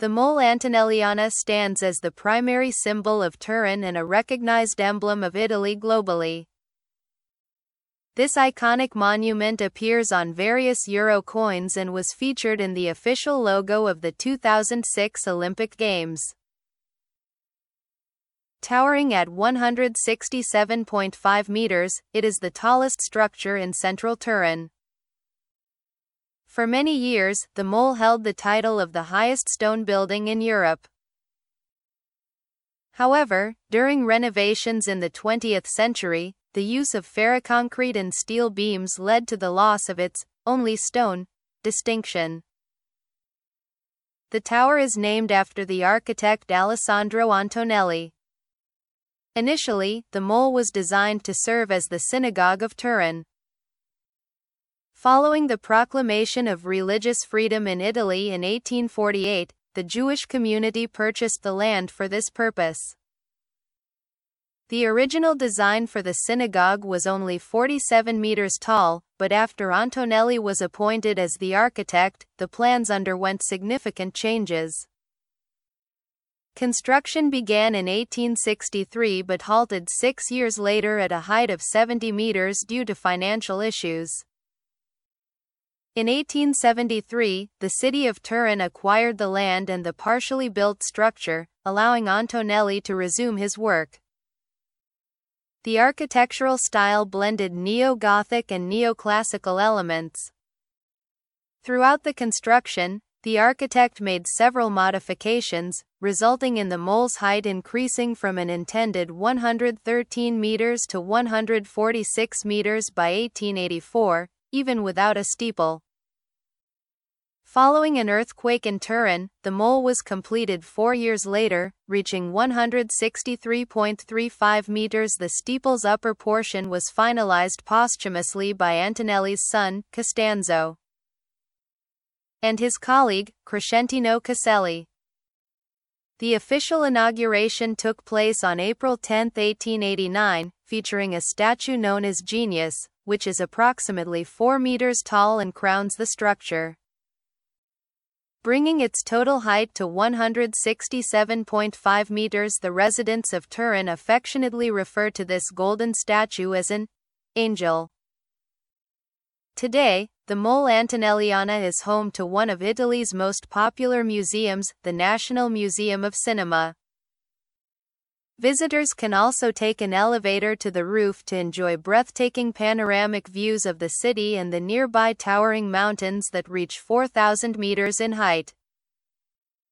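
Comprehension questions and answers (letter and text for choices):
Listen to the audio about this monument and select the appropriate answer.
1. What does the Mole Antonelliana symbolize?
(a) The Italian Renaissance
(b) The city of Turin and Italy worldwide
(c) The industrial revolution in Italy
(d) The Roman heritage of Turin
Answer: (b) The city of Turin and Italy worldwide

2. Who was the architect of the Mole Antonelliana?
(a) Guarino Guarini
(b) Costanzo Antonelli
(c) Alessandro Antonelli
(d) Crescentino Caselli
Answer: (c) Alessandro Antonelli

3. What was the original purpose of the Mole Antonelliana?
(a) A government building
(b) A synagogue for the Jewish community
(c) A royal palace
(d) A museum from the beginning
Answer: (b) A synagogue for the Jewish community

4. Why did the construction of the Mole Antonelliana stop in 1869?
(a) An earthquake damaged the structure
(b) Alessandro Antonelli passed away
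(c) Financial difficulties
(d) The city of Turin decided to build a new synagogue elsewhere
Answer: (c) Financial difficulties

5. When was the Mole Antonelliana officially inaugurated?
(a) 1873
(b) 1884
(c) 1889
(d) 1901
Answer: (c) 1889

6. What was added to the Mole Antonelliana to reach its final height of 167.5 meters?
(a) A second tower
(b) A golden statue known as Genius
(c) A steeple made entirely of stone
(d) A clock tower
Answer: (b) A golden statue known as Genius

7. What is the Mole Antonelliana used for today?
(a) A historical government building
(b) A religious center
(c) The National Museum of Cinema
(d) The official residence of Turin's mayor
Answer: (c) The National Museum of Cinema

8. What can visitors do at the Mole Antonelliana?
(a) Climb to the top using stairs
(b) Watch live theater performances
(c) Take an elevator to the roof for panoramic views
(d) Explore underground tunnels beneath the structure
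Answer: (c) Take an elevator to the roof for panoramic views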